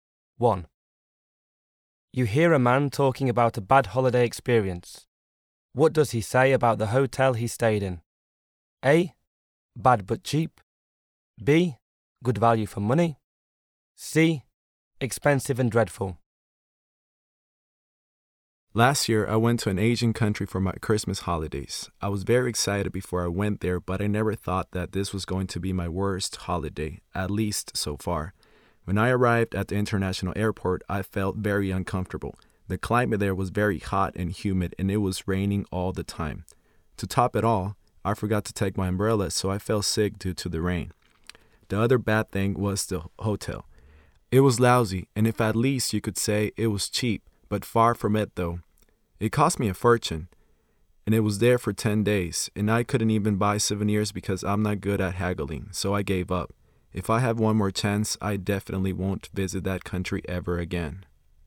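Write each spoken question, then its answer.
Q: What does he say about the hotel he stayed in?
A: C: Expensive and dreadful.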